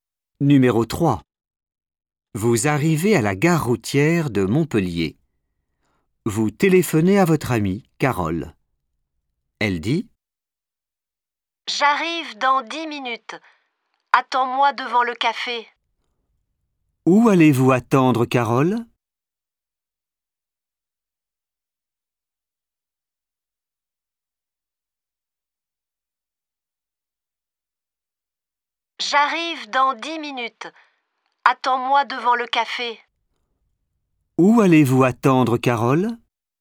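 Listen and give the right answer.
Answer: devant le café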